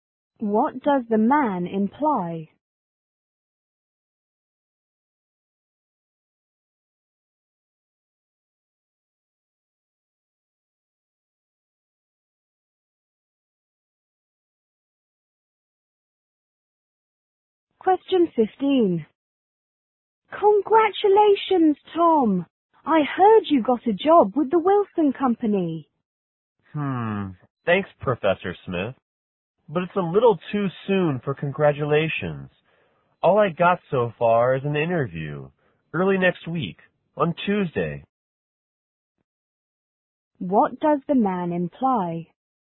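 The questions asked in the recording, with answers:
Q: What does the man imply?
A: He hasn't got the job yet; he only has an interview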